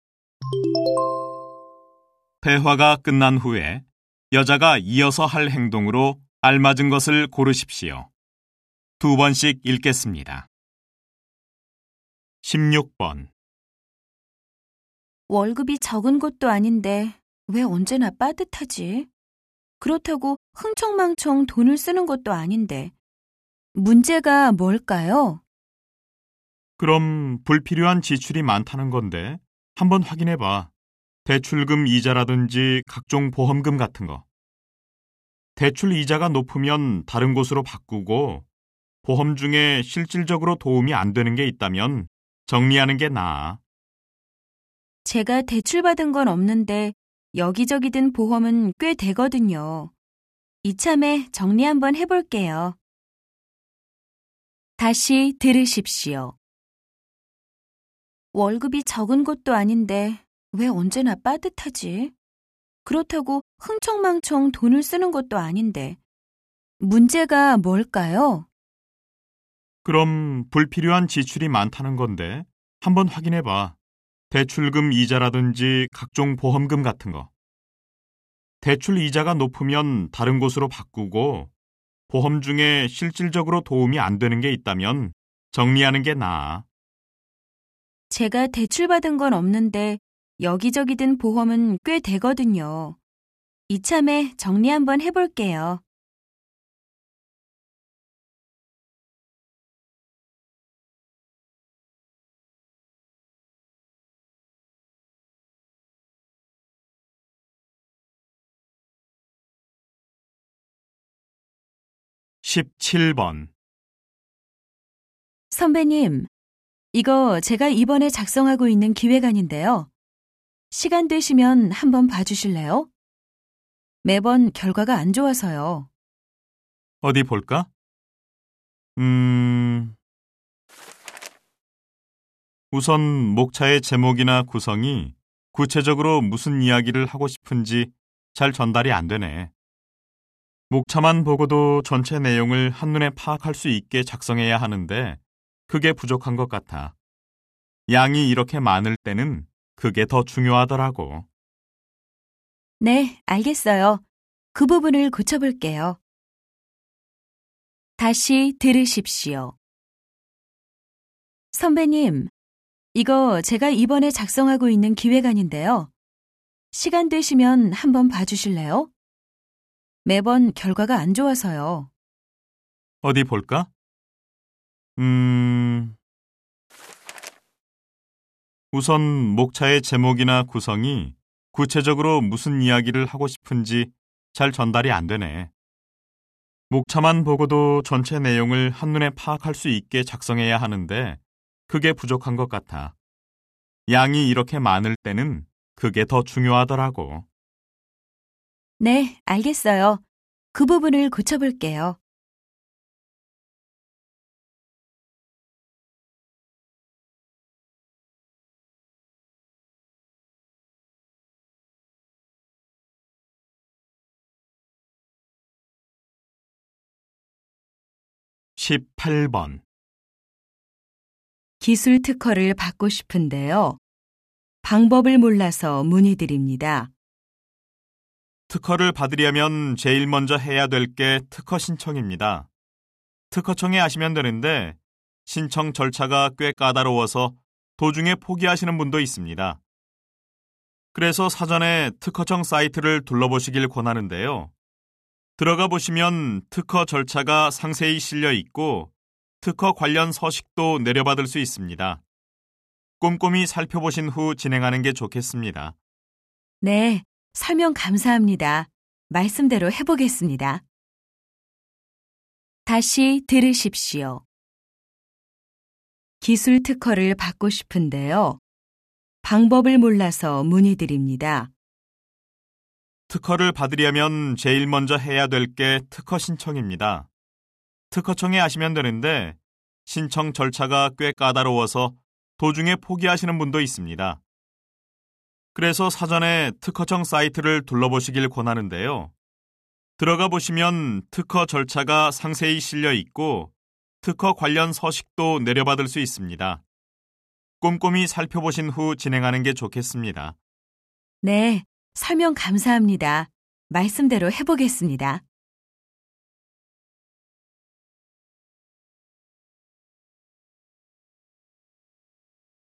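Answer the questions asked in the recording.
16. 가입한 보험을 정리한다
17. 기획안의 목차를 고친다
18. 특허청 사이트를 둘러본다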